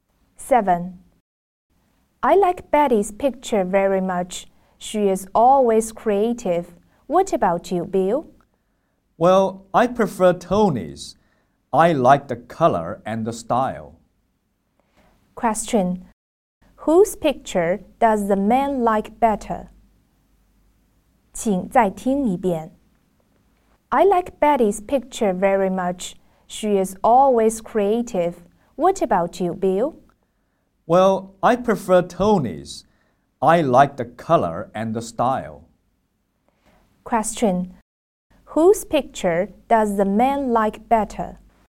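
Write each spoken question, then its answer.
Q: Whose picture does the man like better?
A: Tony's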